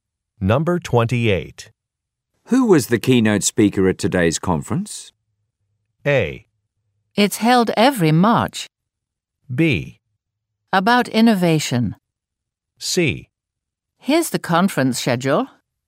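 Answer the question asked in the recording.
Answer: C: Here's the conference schedule.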